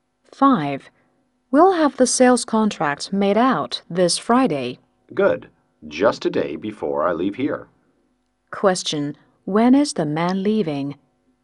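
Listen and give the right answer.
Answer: On Saturday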